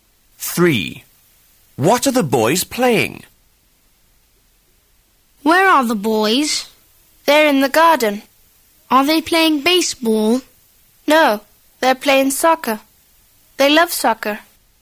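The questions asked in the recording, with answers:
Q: What are the boys playing?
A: Soccer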